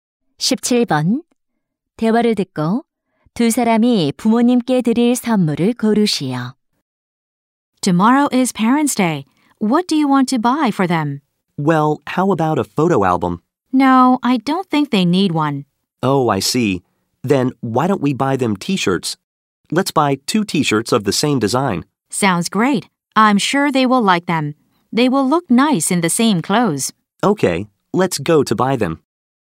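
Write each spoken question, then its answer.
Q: 대화를 듣고 두 사람이 부모님께 드릴 선물을 고르시오.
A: 같은 디자인의 티셔츠 두 장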